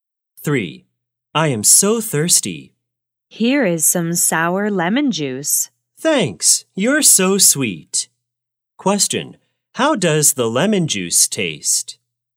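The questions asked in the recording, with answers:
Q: how does the lemon juice taste?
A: Sour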